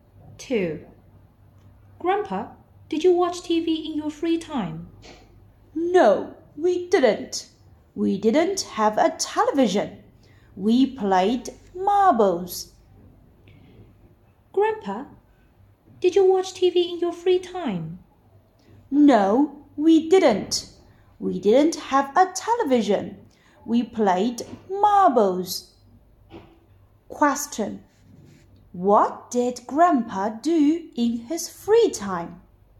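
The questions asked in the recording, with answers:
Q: What did Grandpa do in his free time?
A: He played marbles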